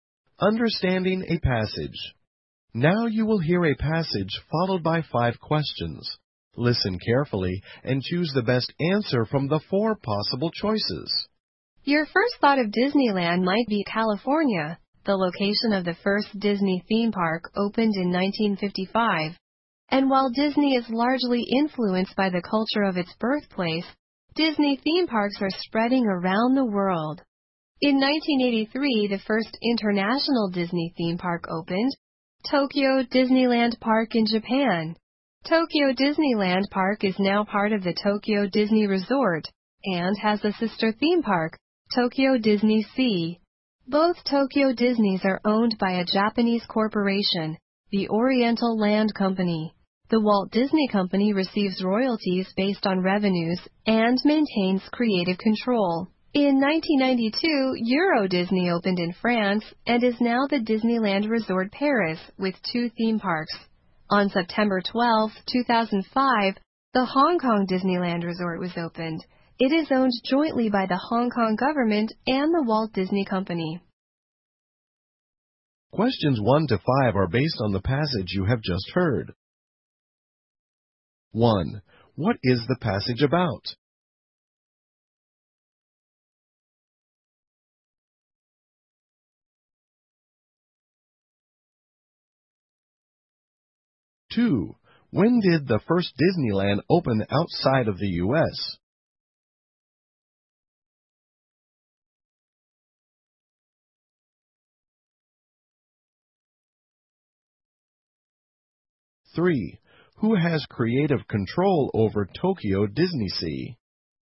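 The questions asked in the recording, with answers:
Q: What is the passage about?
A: Disney theme parks around the world

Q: When did the first Disneyland open outside of the U.S.?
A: In 1983

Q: Who has creative control over Tokyo DisneySea?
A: The Walt Disney Company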